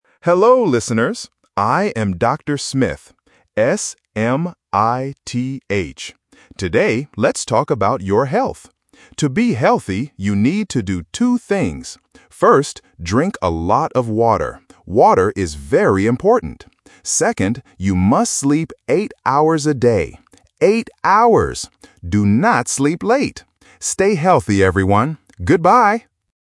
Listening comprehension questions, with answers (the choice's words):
Listen to the radio program. Circle the correct answer (A, B, or C).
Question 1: Who is talking on the radio?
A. Doctor Smile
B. Doctor Smith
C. Doctor Brown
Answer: Doctor Smith

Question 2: What does the doctor say to drink?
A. A lot of water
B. A lot of milk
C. A lot of tea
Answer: A lot of water

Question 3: How many hours should you sleep a day?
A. Eight hours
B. Eighteen hours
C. Ten hours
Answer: Eight hours

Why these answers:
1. The speaker explicitly says his name and spells it out: "S-M-I-T-H" (A1 spelling technique). Option A (Doctor Smile) is a phonetic trap because "Smith" and "Smile" sound similar to beginners. Option C is not mentioned.
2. The doctor clearly states: "First, drink a lot of water." Options B (milk) and C (tea) are traps using other common, healthy drinks, but they are not in the audio.
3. The doctor says, "sleep eight hours a day," and repeats the phrase "Eight hours" to emphasize the number (A1 repetition technique). Option B (Eighteen hours) is a common phonetic trap because "eight" and "eighteen" sound confusing. Option C is a plausible number but is not mentioned.

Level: A1